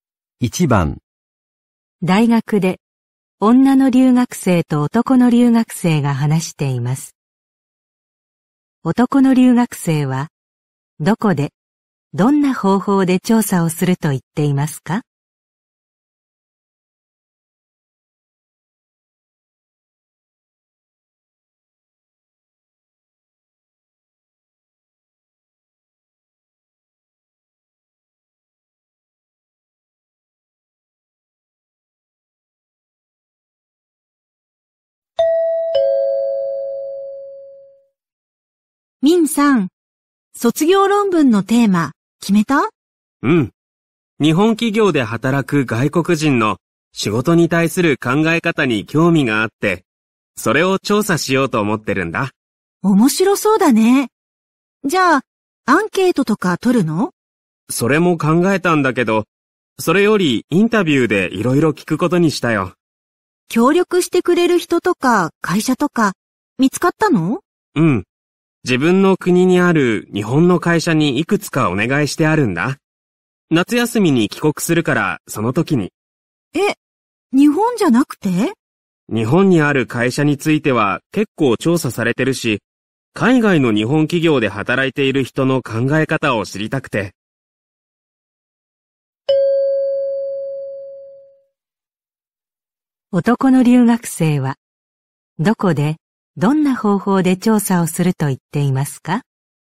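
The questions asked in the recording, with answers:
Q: 男の留学生は、どこで、どんな方法で調査をすると言っていますか?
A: 自分の国にある日本の会社で、インタビューで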